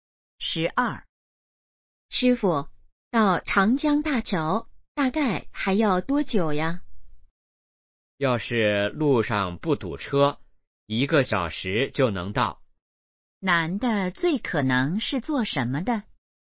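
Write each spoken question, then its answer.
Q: 男的最可能是做什么的?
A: 司机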